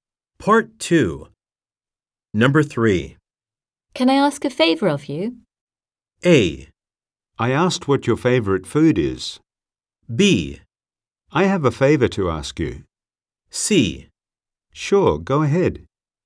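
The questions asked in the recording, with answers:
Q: Can I ask a favor of you?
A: C: Sure, go ahead.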